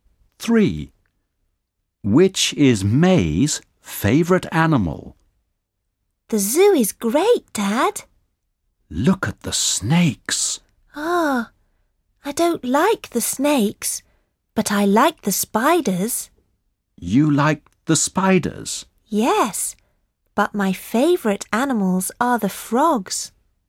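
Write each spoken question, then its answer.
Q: Which is May's favourite animal?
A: frogs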